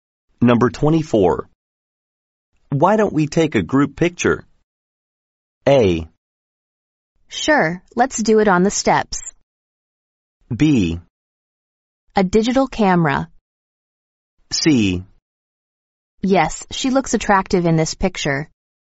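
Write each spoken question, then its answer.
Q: Why don't we take a group picture?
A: A: Sure, let's do it on the steps.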